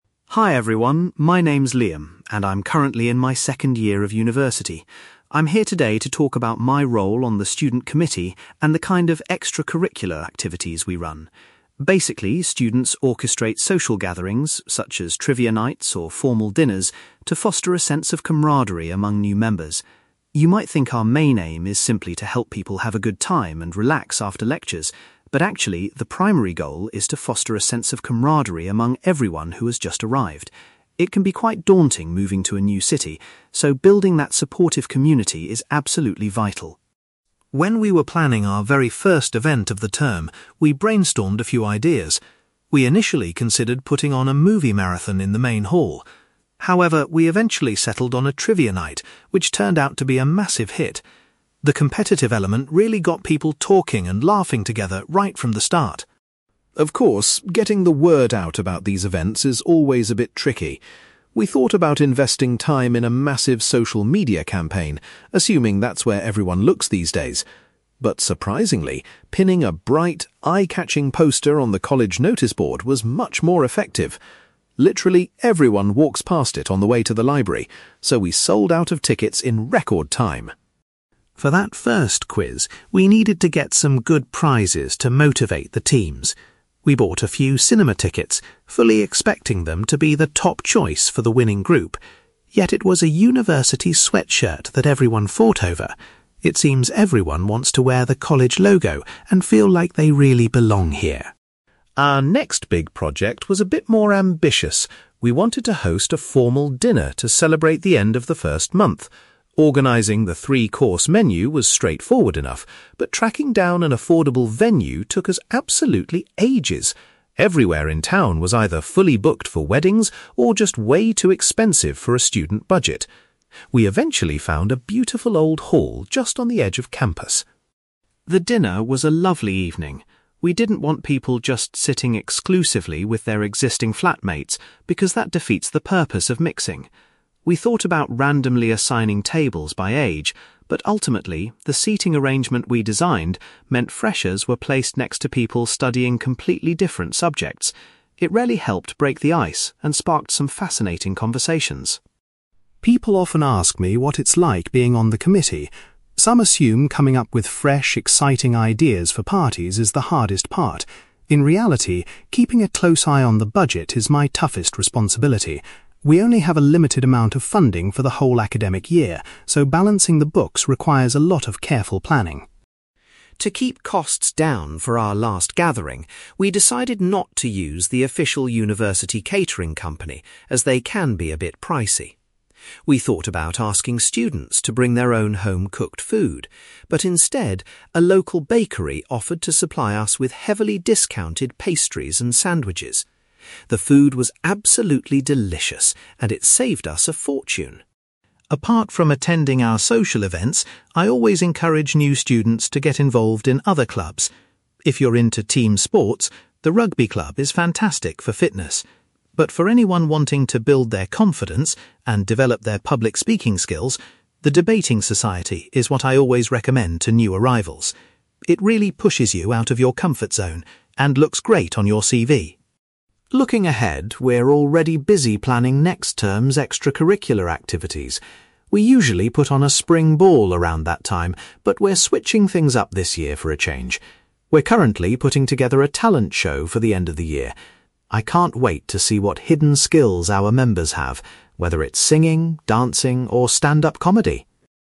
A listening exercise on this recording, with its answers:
For questions 9-18, complete the sentences with a word or short phrase.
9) Liam explains that the main purpose of the social events is to build a feeling of (9)........................... amongst the new students.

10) The committee's first highly successful event was a (10)........................... which encouraged interaction.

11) Liam discovered that the best way to advertise events was by using a (11)........................... in the college.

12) Liam was surprised to find that a (12)........................... was the most highly desired prize.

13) When organising the formal dinner, the most difficult task was securing a (13)........................... for the evening.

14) Liam believes that a carefully planned (14)........................... helped students mix with people from other courses.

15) Liam says that managing the (15)........................... is the most challenging aspect of his role on the committee.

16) For their most recent event, the food was supplied by a (16)........................... in the local town.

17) Liam suggests that new students should join the (17)........................... to improve their confidence when speaking.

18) Liam is looking forward to organising a (18)........................... for students next term.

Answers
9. camaraderie
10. trivia night
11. noticeboard
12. sweatshirt
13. venue
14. seating arrangement
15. budget
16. bakery
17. debating society
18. talent show

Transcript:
Liam: Hi everyone, my name is Liam, and I'm currently in my second year of university. I'm here today to talk about my role on the student committee and the kind of extracurricular activities we run. Basically, students orchestrate social gatherings, such as trivia nights or formal dinners, to foster a sense of camaraderie among new members. You might think our main aim is simply to help people have a good time and relax after lectures, but actually, the primary goal is to foster a sense of camaraderie among everyone who has just arrived. It can be quite daunting moving to a new city, so building that supportive community is absolutely vital.
When we were planning our very first event of the term, we brainstormed a few ideas. We initially considered putting on a movie marathon in the main hall. However, we eventually settled on a trivia night, which turned out to be a massive hit. The competitive element really got people talking and laughing together right from the start.
Of course, getting the word out about these events is always a bit tricky. We thought about investing time in a massive social media campaign, assuming that's where everyone looks these days. But surprisingly, pinning a bright, eye-catching poster on the college noticeboard was much more effective. Literally everyone walks past it on the way to the library, so we sold out of tickets in record time!
For that first quiz, we needed to get some good prizes to motivate the teams. We bought a few cinema tickets, fully expecting them to be the top choice for the winning group. Yet, it was a university sweatshirt that everyone fought over! It seems everyone wants to wear the college logo and feel like they really belong here.
Our next big project was a bit more ambitious. We wanted to host a formal dinner to celebrate the end of the first month. Organising the three-course menu was straightforward enough, but tracking down an affordable venue took us absolutely ages. Everywhere in town was either fully booked for weddings or just way too expensive for a student budget. We eventually found a beautiful old hall just on the edge of campus.
The dinner was a lovely evening. We didn't want people just sitting exclusively with their existing flatmates because that defeats the purpose of mixing. We thought about randomly assigning tables by age, but ultimately, the seating arrangement we designed meant freshers were placed next to people studying completely different subjects. It really helped break the ice and sparked some fascinating conversations.
People often ask me what it's like being on the committee. Some assume coming up with fresh, exciting ideas for parties is the hardest part. In reality, keeping a close eye on the budget is my toughest responsibility. We only have a limited amount of funding for the whole academic year, so balancing the books requires a lot of careful planning.
To keep costs down for our last gathering, we decided not to use the official university catering company, as they can be a bit pricey. We thought about asking students to bring their own home-cooked food, but instead, a local bakery offered to supply us with heavily discounted pastries and sandwiches. The food was absolutely delicious, and it saved us a fortune!
Apart from attending our social events, I always encourage new students to get involved in other clubs. If you're into team sports, the rugby club is fantastic for fitness. But for anyone wanting to build their confidence and develop their public speaking skills, the debating society is what I always recommend to new arrivals. It really pushes you out of your comfort zone and looks great on your CV.
Looking ahead, we're already busy planning next term's extracurricular activities. We usually put on a spring ball around that time, but we're switching things up this year for a change. We're currently putting together a talent show for the end of the year. I can't wait to see what hidden skills our members have, whether it's singing, dancing, or stand-up comedy!

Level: B2